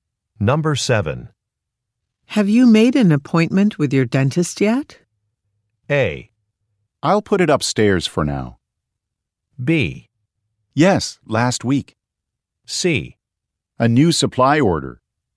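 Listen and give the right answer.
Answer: B: Yes, last week.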